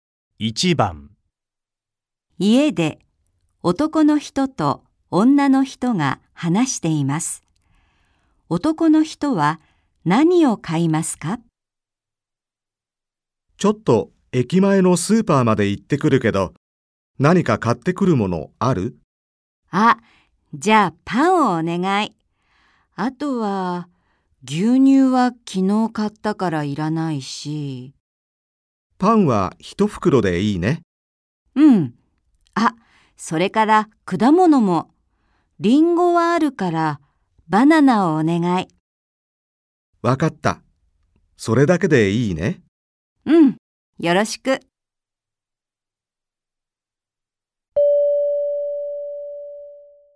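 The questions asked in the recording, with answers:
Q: 男の人は何を買いますか?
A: パン一袋とバナナ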